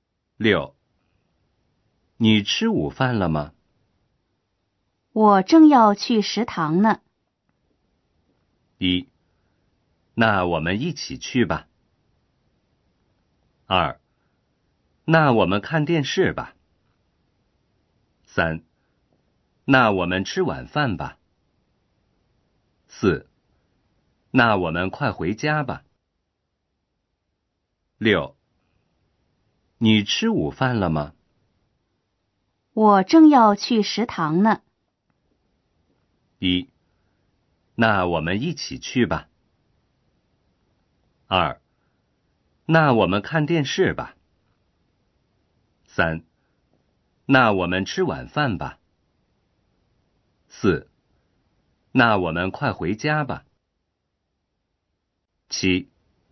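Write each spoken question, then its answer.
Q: 你吃午饭了吗?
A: 1: 那我们一起去吧。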